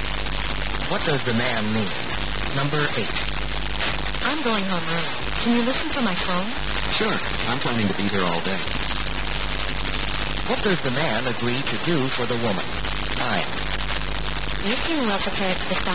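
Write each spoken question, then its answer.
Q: What does the man agree to do for the woman?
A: Answer her phone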